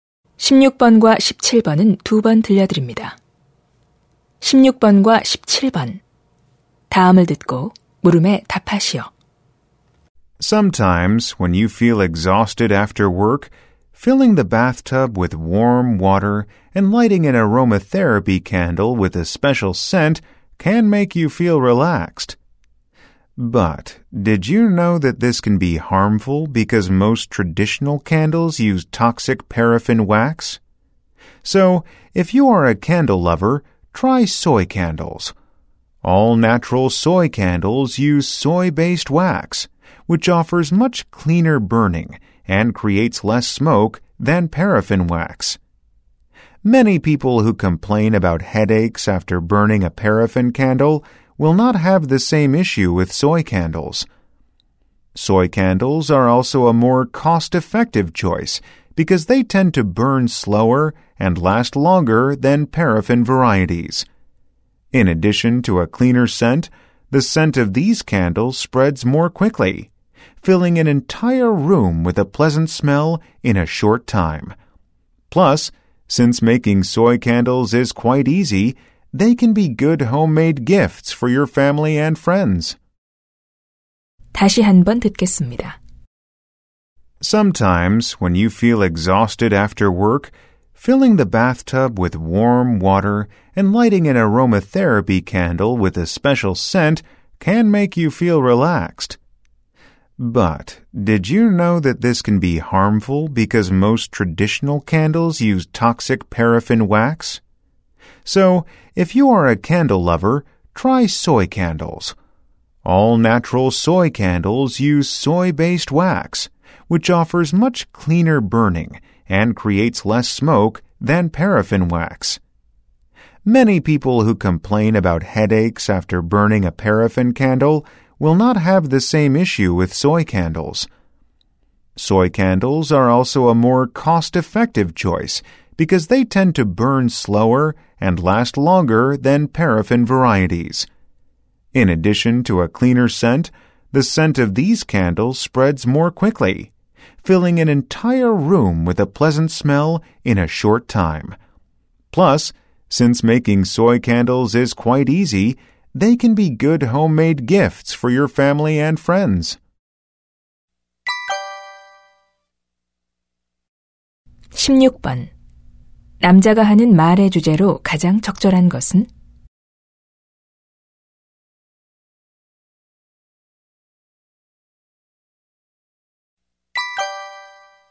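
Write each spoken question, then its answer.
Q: 남자가 하는 말의 주제로 가장 적절한 것은?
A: 콩(소이) 양초의 장점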